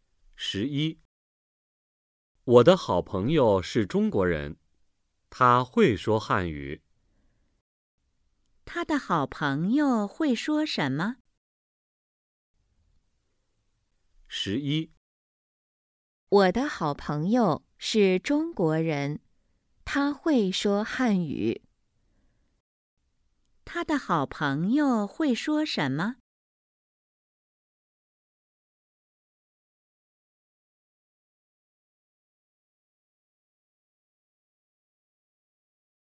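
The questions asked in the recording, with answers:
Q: 他的好朋友会说什么?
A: 汉语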